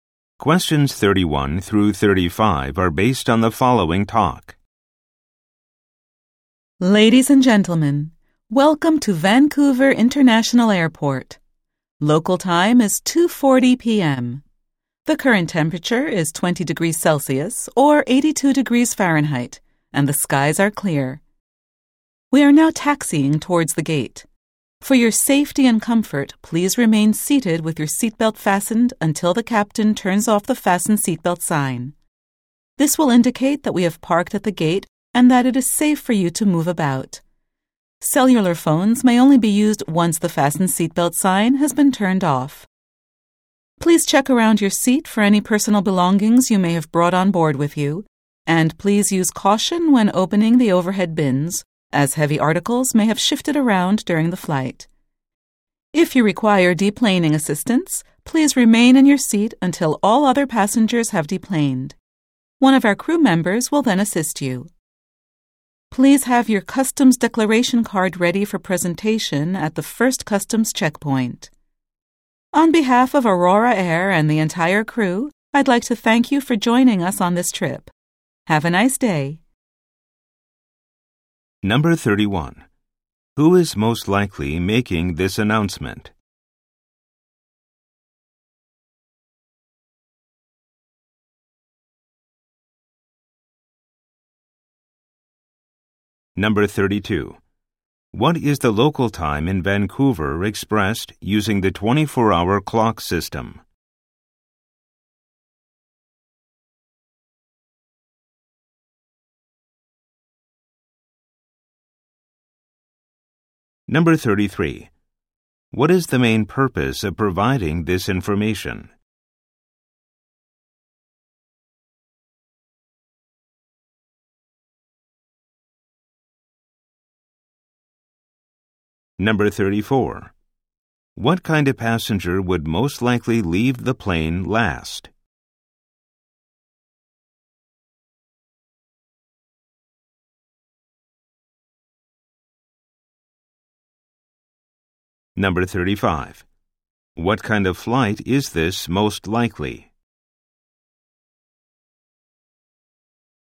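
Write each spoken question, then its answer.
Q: What is the local time in Vancouver expressed using the 24-hour clock system?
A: 14:40

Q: What kind of passenger would most likely leave the plane last?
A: A passenger who needs help getting off the plane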